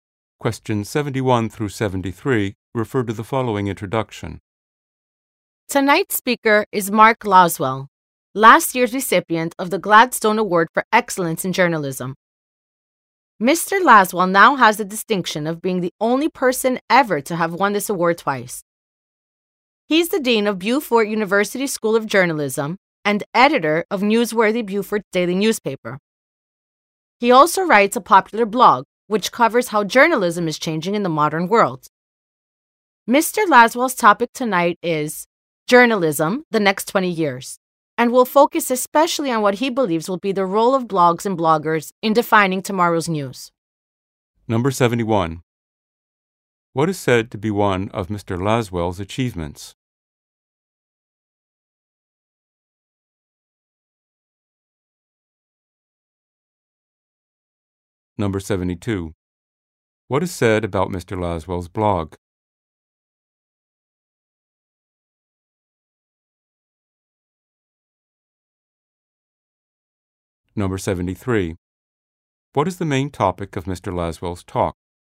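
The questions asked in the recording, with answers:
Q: What is said to be one of Mr. Laswell's achievements?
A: He is the only person to have won the Gladstone Award twice

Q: What is said about Mr. Laswell's blog?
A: It is popular and covers how journalism is changing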